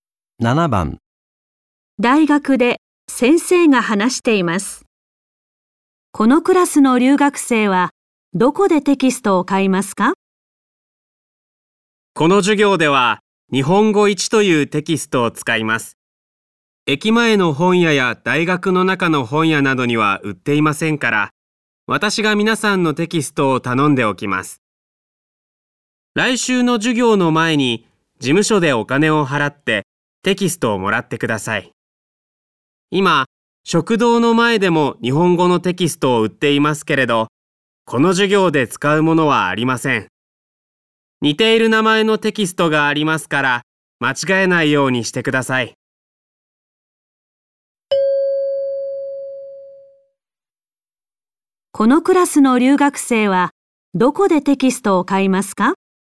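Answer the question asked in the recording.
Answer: 事務所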